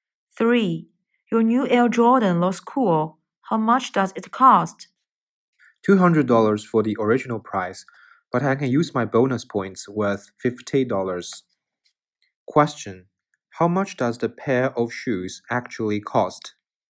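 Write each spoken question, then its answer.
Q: How much does the pair of shoes actually cost?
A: $150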